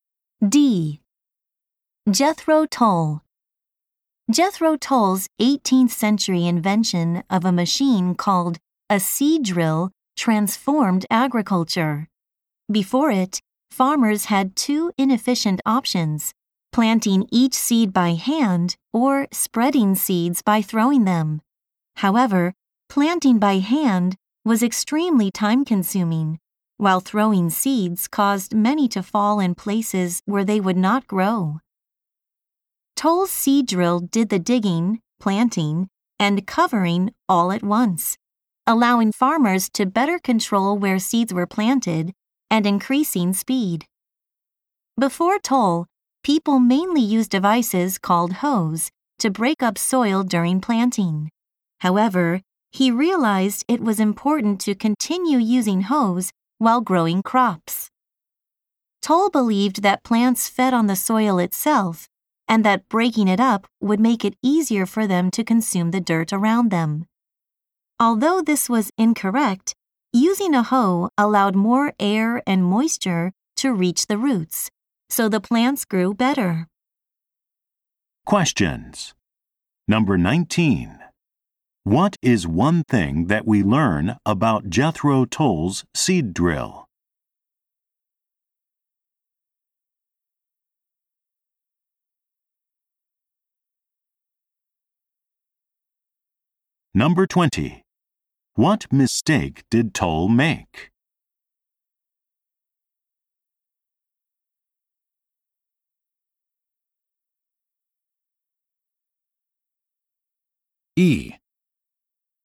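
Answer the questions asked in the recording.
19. It dug, planted and covered seeds all at once, giving farmers more control and more speed.
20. He believed plants fed on the soil itself.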